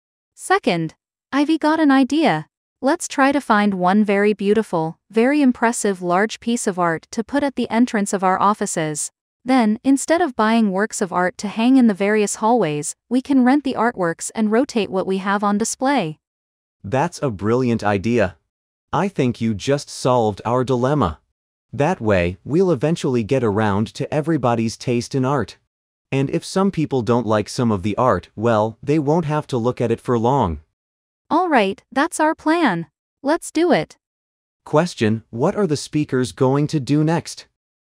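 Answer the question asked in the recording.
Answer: Get one impressive large artwork for the entrance and rent other artworks to rotate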